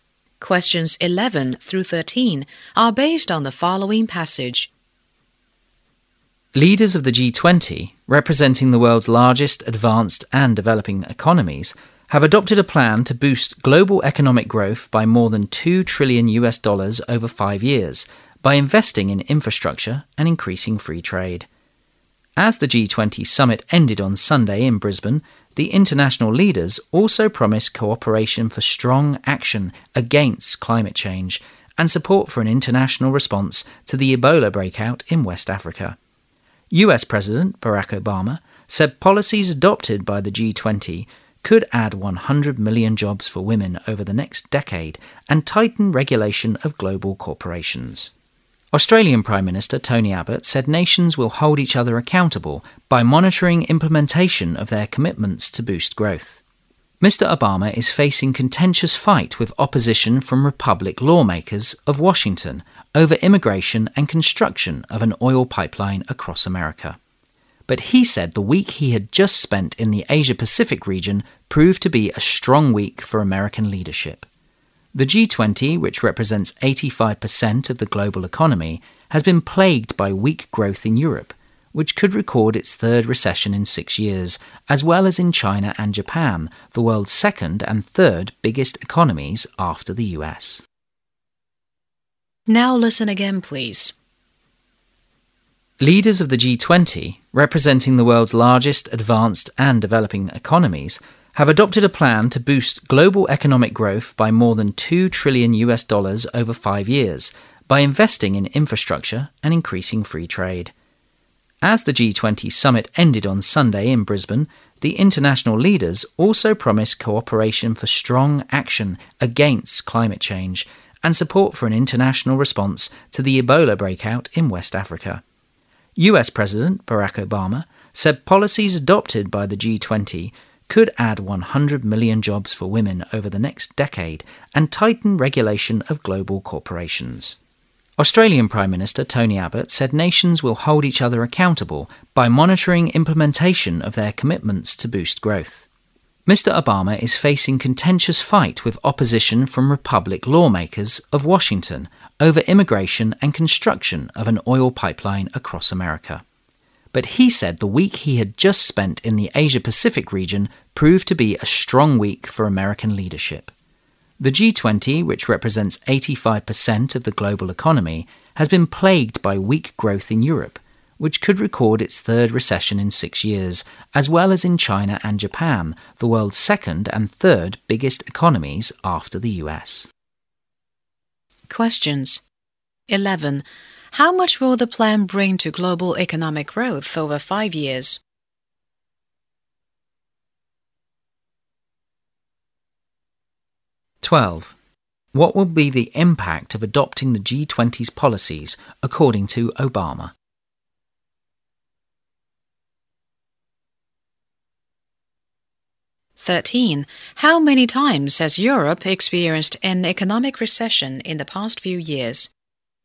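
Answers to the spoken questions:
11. More than $2 trillion
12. Add 100 million jobs for women and tighten regulation of global corporations
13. Twice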